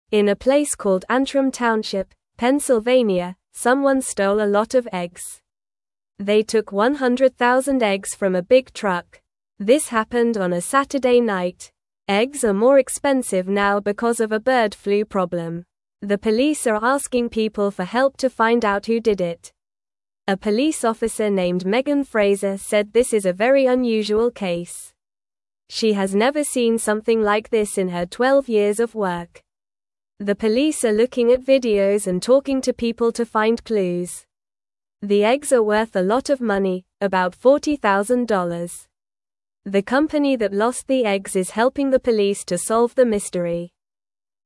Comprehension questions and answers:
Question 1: In a place (1)______ Antrim Township, Pennsylvania,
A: called

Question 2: someone (2)______ a lot of eggs.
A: stole

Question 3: The police are (3)______ people for help to find out who did it.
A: asking

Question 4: A police officer (4)______ Megan Frazer said this is a very unusual case.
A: named

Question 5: She has never (5)______ something like this in her 12 years of work.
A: seen

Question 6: The police are (6)______ at videos and talking to people to (7)______ clues.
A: looking

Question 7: The police are (6)______ at videos and talking to people to (7)______ clues.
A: find

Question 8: The company that lost the eggs is helping the police to (8)______ the mystery.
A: solve

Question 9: Where did the egg theft happen?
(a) New York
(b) California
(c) Antrim Township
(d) Texas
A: (c) Antrim Township

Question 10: How many eggs were stolen?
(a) 10,000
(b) 100,000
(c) 1,000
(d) 500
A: (b) 100,000

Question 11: What day did the theft happen?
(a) Sunday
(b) Friday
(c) Monday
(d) Saturday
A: (d) Saturday

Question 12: Who is asking for help to find the thief?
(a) The police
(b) The farmer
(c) The eggs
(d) The truck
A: (a) The police

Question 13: What is the name of the police officer?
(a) Sarah Smith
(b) John Doe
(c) Megan Frazer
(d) Emily Brown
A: (c) Megan Frazer

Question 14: How long has the police officer worked?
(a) 5 years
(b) 12 years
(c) 2 years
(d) 10 years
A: (b) 12 years

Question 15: How much money are the stolen eggs worth?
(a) $4,000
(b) $400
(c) $40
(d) $40,000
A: (d) $40,000

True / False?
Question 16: The police do not need help to find the person who stole the eggs.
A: False

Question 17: They stole 100,000 eggs from a big truck.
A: True

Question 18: The company that lost the eggs is helping the police.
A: True

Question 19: A police officer named Megan Frazer does not think this is a strange case.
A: False

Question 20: This happened on a Saturday night.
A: True

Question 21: No one took a lot of eggs in Antrim Township, Pennsylvania.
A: False

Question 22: The stolen eggs are worth about $40,000.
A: True

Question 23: Eggs are not more expensive now because of bird flu.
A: False

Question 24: Where did the eggs get stolen from?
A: They were stolen from a big truck.

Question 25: How many eggs were taken?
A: One hundred thousand eggs were taken.

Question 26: What day of the week did the stealing happen?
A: It happened on Saturday.

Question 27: Who is trying to find the person who stole the eggs?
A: The police are trying to find the person.

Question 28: What is the name of the police officer in the story?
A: The police officer's name is Megan Frazer.

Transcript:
In a place called Antrim Township, Pennsylvania, someone stole a lot of eggs. They took 100,000 eggs from a big truck. Eggs are more expensive now because of a bird flu problem. The police are asking people for help to find out who did it.
A police officer named Megan Frazer said this is a very unusual case. She has never seen something like this in her 12 years of work. The police are looking at videos and talking to people to find clues. The eggs are worth a lot of money, about $40,000. The company that lost the eggs is helping the police to solve the mystery.

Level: Level 1

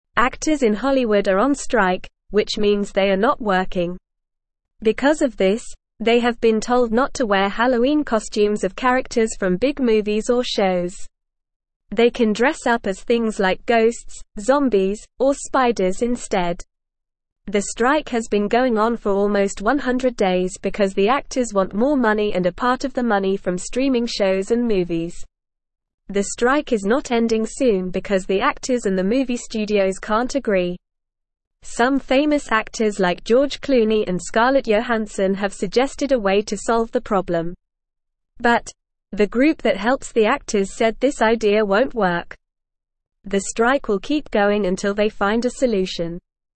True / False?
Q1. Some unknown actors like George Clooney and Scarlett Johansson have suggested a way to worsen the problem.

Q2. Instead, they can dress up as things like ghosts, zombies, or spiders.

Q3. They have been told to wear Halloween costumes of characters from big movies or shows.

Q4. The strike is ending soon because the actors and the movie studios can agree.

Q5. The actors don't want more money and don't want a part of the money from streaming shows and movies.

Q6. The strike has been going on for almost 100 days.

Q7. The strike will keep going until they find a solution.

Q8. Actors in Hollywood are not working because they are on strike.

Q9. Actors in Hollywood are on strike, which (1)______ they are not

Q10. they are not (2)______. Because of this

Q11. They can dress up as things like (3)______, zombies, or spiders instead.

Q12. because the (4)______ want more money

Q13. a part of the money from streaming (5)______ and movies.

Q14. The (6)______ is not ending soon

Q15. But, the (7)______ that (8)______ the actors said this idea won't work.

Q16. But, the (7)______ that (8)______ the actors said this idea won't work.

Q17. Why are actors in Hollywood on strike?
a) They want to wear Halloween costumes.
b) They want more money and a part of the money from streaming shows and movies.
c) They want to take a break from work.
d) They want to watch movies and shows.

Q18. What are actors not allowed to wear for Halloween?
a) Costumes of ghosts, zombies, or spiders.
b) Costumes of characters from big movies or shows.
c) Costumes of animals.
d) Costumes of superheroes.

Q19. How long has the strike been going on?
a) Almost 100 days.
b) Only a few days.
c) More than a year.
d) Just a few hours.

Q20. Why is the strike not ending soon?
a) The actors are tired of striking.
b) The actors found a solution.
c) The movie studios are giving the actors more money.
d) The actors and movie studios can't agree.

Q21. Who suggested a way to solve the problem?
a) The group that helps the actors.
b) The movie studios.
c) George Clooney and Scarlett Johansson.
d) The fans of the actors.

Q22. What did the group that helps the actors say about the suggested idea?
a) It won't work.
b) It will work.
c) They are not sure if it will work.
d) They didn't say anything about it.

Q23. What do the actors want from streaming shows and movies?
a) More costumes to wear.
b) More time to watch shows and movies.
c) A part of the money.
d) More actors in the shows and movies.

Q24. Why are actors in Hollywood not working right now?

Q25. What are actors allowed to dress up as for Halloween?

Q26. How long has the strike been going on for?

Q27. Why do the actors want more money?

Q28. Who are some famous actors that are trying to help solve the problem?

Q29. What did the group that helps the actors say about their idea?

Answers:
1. False
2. True
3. False
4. False
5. False
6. True
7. True
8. True
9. means
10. working
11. ghosts
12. actors
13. shows
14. strike
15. group
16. helps
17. b) They want more money and a part of the money from streaming shows and movies.
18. b) Costumes of characters from big movies or shows.
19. a) Almost 100 days.
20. d) The actors and movie studios can't agree.
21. c) George Clooney and Scarlett Johansson.
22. a) It won't work.
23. c) A part of the money.
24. Because they are on strike.
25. They can dress up as ghosts, zombies, or spiders.
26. It has been going on for almost 100 days.
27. Because they want to be paid more and get a part of the money from streaming shows and movies.
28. George Clooney and Scarlett Johansson.
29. They said the idea won't work.

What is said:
Actors in Hollywood are on strike, which means they are not working. Because of this, they have been told not to wear Halloween costumes of characters from big movies or shows. They can dress up as things like ghosts, zombies, or spiders instead. The strike has been going on for almost 100 days because the actors want more money and a part of the money from streaming shows and movies.
The strike is not ending soon because the actors and the movie studios can't agree. Some famous actors like George Clooney and Scarlett Johansson have suggested a way to solve the problem. But, the group that helps the actors said this idea won't work.

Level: Level 1

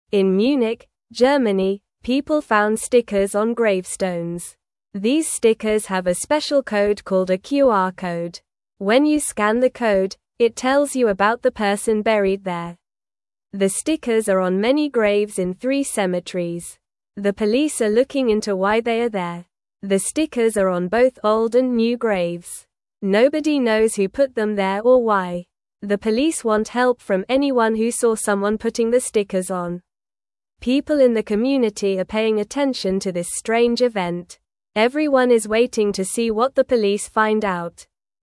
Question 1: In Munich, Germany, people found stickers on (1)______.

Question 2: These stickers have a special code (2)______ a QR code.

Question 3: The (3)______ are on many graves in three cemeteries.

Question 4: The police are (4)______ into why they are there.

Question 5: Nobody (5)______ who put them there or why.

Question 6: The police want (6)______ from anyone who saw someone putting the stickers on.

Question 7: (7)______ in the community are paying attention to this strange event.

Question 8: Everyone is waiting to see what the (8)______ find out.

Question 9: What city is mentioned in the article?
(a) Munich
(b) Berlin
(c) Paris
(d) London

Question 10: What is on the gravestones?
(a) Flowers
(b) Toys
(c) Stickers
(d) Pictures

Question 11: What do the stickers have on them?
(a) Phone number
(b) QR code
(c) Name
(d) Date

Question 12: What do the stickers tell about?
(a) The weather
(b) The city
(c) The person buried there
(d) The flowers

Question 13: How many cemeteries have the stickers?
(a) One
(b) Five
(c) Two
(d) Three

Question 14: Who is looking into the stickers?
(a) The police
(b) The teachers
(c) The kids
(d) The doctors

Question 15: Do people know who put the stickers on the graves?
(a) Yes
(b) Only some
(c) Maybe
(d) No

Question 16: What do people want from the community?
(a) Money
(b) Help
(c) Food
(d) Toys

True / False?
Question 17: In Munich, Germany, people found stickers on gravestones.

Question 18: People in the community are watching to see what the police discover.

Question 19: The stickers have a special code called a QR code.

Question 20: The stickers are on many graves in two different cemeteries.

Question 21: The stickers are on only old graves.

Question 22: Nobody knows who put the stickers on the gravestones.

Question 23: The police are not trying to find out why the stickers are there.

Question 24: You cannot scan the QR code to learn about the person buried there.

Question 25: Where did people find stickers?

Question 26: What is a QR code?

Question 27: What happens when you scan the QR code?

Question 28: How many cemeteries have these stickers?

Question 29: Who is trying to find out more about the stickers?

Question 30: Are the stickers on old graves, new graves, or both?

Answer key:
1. gravestones
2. called
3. stickers
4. looking
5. knows
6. help
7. People
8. police
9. (a) Munich
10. (c) Stickers
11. (b) QR code
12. (c) The person buried there
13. (d) Three
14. (a) The police
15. (d) No
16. (b) Help
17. True
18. True
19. True
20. False
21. False
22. True
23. False
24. False
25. People found stickers on gravestones in cemeteries.
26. A QR code is a special code that you can scan with a phone.
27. When you scan the QR code, it tells you about the person buried there.
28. There are stickers in three cemeteries.
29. The police are trying to find out more about the stickers.
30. The stickers are on both old graves and new graves.

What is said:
These stickers have a special code called a QR code. When you scan the code, it tells you about the person buried there. The stickers are on many graves in three cemeteries. The police are looking into why they are there.
The stickers are on both old and new graves. Nobody knows who put them there or why. The police want help from anyone who saw someone putting the stickers on. People in the community are paying attention to this strange event. Everyone is waiting to see what the police find out.

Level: Level 1

